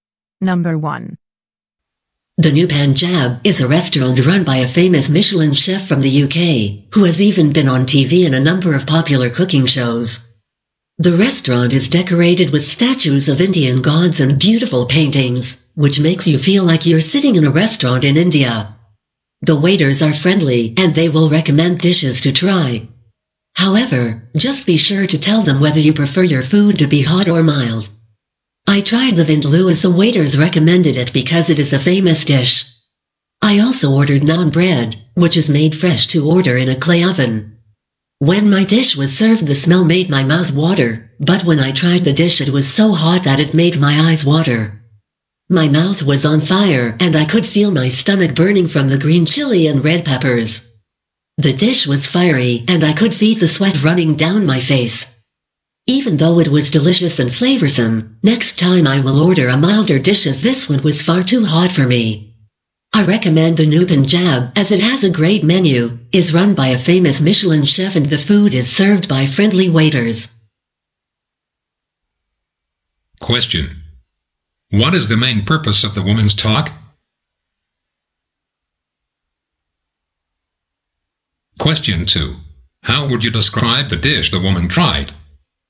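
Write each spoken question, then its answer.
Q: What is the main purpose of the woman's talk?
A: To review and recommend the New Panjab restaurant

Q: How would you describe the dish the woman tried?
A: Very hot and spicy, but delicious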